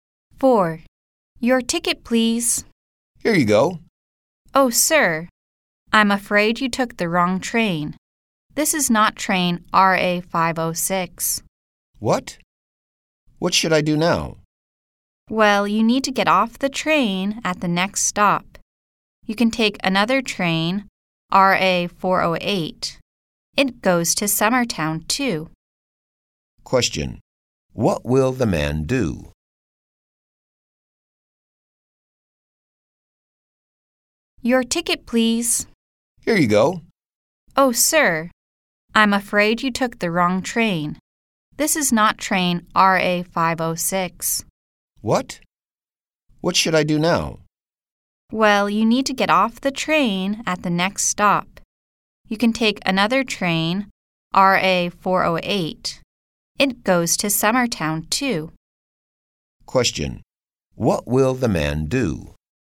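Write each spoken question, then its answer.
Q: What will the man do?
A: Get off at the next stop and take train RA408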